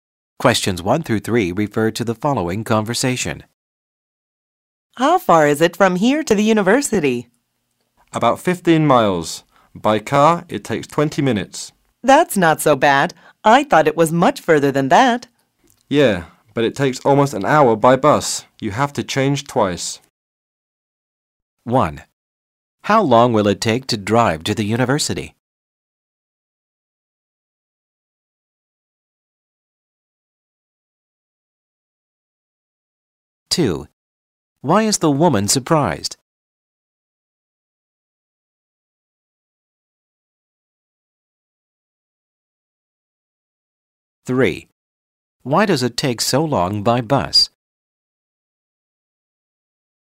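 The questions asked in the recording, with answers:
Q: How long will it take to drive to the university?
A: 20 minutes

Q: Why is the woman surprised?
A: She thought it was much further

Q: Why does it take so long by bus?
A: You have to change buses twice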